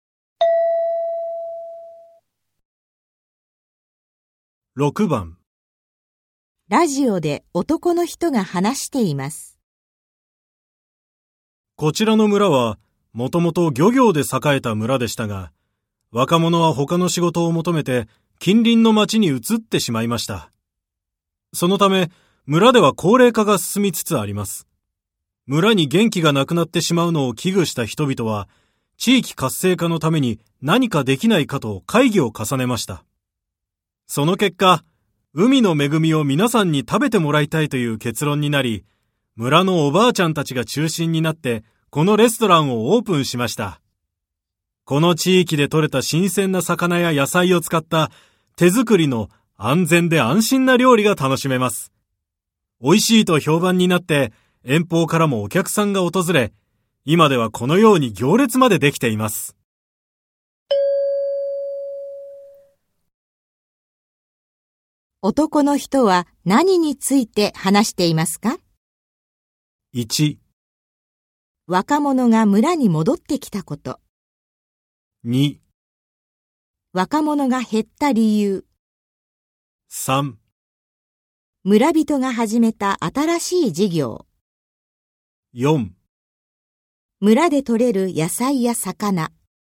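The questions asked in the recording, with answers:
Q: 男の人は何について話していますか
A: 3: 村人が始めた新しい事業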